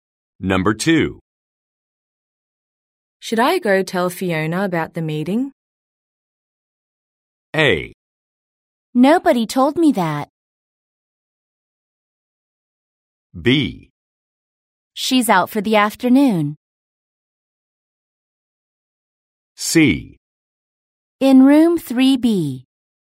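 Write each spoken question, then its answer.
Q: Should I go tell Fiona about the meeting?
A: B: She's out for the afternoon.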